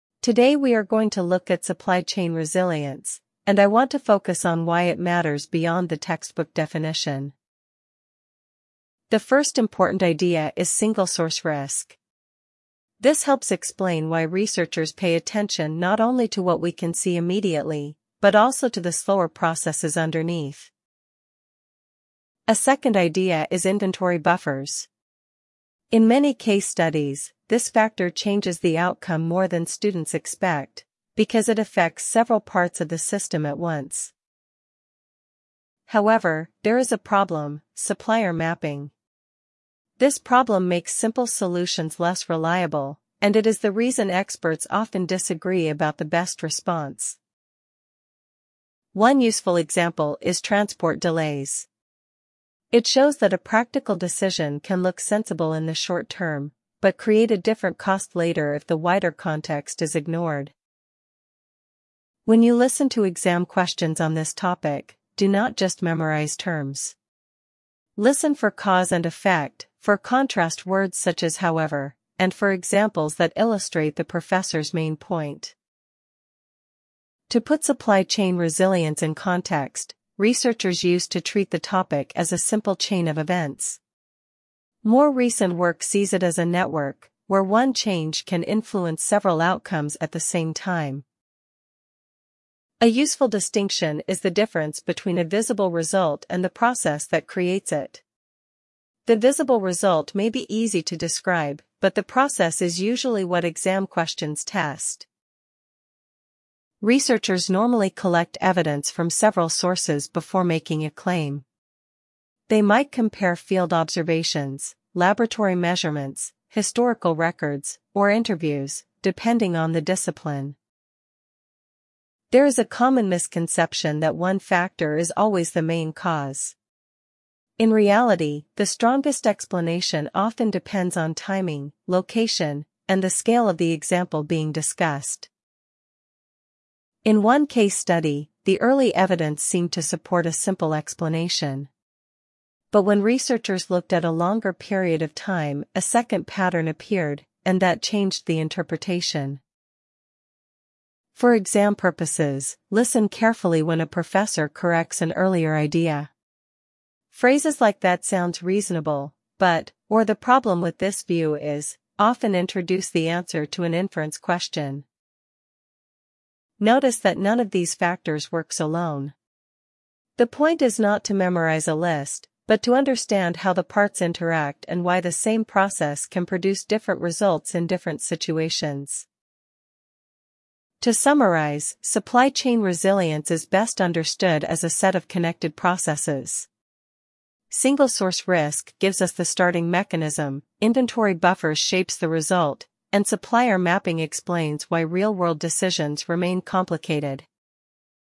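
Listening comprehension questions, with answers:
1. What is the lecture mainly about?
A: Supply chain resilience

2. What is the first important idea?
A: Single-source risk

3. What is the second idea discussed?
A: Inventory buffers

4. Why is the issue complicated?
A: It makes simple solutions less reliable

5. What does the example show?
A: Short-term decisions can have later costs

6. What should listeners pay attention to in exam questions?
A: Cause, effect, contrast words, and examples

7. How does the professor summarise the topic?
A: As connected processes

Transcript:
Today we are going to look at supply chain resilience, and I want to focus on why it matters beyond the textbook definition.
The first important idea is single-source risk. This helps explain why researchers pay attention not only to what we can see immediately, but also to the slower processes underneath.
A second idea is inventory buffers. 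In many case studies, this factor changes the outcome more than students expect, because it affects several parts of the system at once.
However, there is a problem: supplier mapping. This problem makes simple solutions less reliable, and it is the reason experts often disagree about the best response.
One useful example is transport delays. It shows that a practical decision can look sensible in the short term, but create a different cost later if the wider context is ignored.
When you listen to exam questions on this topic, do not just memorise terms. Listen for cause and effect, for contrast words such as however, and for examples that illustrate the professor's main point.
To put supply chain resilience in context, researchers used to treat the topic as a simple chain of events. More recent work sees it as a network, where one change can influence several outcomes at the same time.
A useful distinction is the difference between a visible result and the process that creates it. 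The visible result may be easy to describe, but the process is usually what exam questions test.
Researchers normally collect evidence from several sources before making a claim. They might compare field observations, laboratory measurements, historical records, or interviews, depending on the discipline.
There is a common misconception that one factor is always the main cause. In reality, the strongest explanation often depends on timing, location, and the scale of the example being discussed.
In one case study, the early evidence seemed to support a simple explanation. But when researchers looked at a longer period of time, a second pattern appeared, and that changed the interpretation.
For exam purposes, listen carefully when a professor corrects an earlier idea. Phrases like that sounds reasonable, but, or the problem with this view is, often introduce the answer to an inference question.
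Notice that none of these factors works alone. The point is not to memorise a list, but to understand how the parts interact and why the same process can produce different results in different situations.
To summarise, supply chain resilience is best understood as a set of connected processes. Single-source risk gives us the starting mechanism, inventory buffers shapes the result, and supplier mapping explains why real-world decisions remain complicated.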